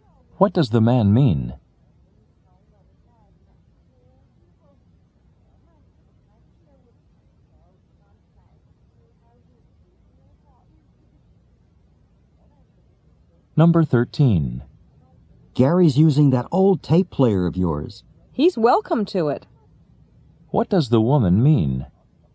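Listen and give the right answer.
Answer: She doesn't mind Gary using her old tape player.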